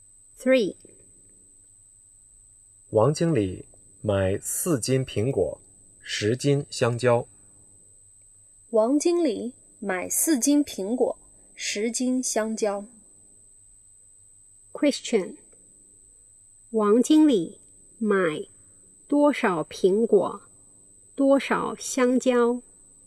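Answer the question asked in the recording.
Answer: 4斤苹果,10斤香蕉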